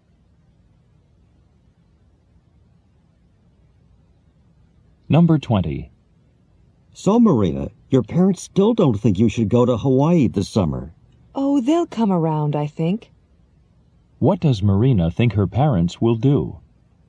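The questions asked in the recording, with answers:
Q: What does Marina think her parents will do?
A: Change their minds and agree to let her go.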